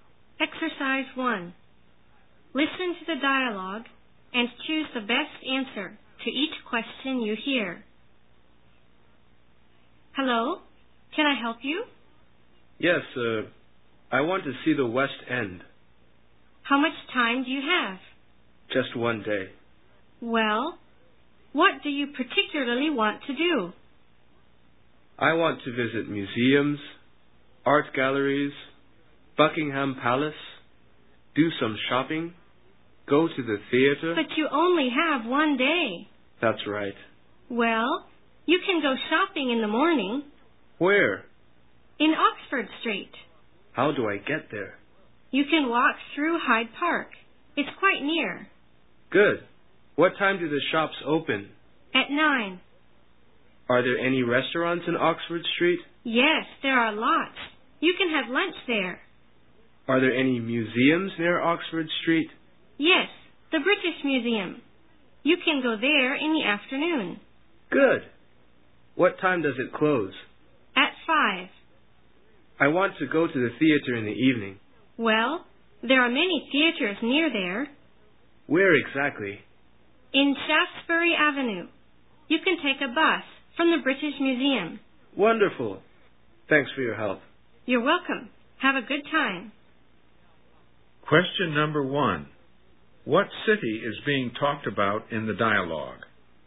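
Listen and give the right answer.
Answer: London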